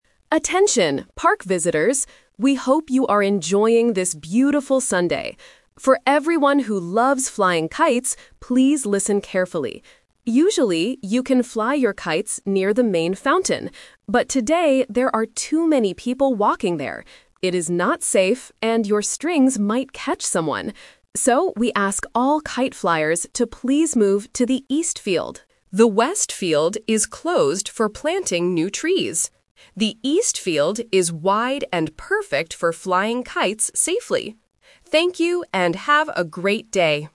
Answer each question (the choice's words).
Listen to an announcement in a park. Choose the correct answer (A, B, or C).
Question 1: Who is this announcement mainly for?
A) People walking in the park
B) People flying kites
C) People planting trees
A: People flying kites

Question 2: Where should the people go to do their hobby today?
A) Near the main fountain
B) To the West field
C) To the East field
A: To the East field

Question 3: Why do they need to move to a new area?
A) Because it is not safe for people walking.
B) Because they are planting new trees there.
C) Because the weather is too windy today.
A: Because it is not safe for people walking.

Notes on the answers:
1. The announcer explicitly calls for this group: "For everyone who loves flying kites, please listen carefully." Trap: Option A (People walking) is a distractor because they are mentioned as the reason for the change, but the announcement is directing the kite flyers. Option C is a distractor related to the West field.
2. The announcer gives the new direction clearly: "...please move to the East field." Trap (The Twist): Option A (Near the main fountain) is where they usually go, but not today. Option B (The West field) is a strong trap, but it is currently "closed" (đóng cửa).
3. The reason given is: "...there are too many people walking there. It is not safe..." Trap: Option B (planting new trees) is the reason the West field is closed, not the reason the kite flyers have to move away from the fountain. Option C is a plausible guess for kite flying, but the audio says it is a "beautiful Sunday".

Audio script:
Announcer: Attention, park visitors. We hope you are enjoying this beautiful Sunday. For everyone who loves flying kites, please listen carefully. Usually, you can fly your kites near the main fountain. But today, there are too many people walking there. It is not safe, and your strings might catch someone. So, we ask all kite flyers to please move to the East field. The West field is closed for planting new trees. The East field is wide and perfect for flying kites safely. Thank you, and have a great day!

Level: A2